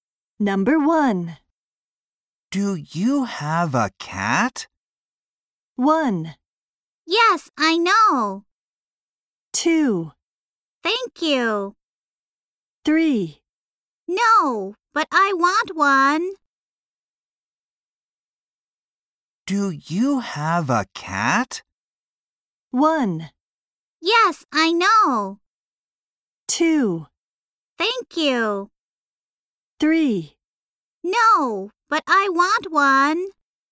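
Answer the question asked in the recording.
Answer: 3: No, but I want one.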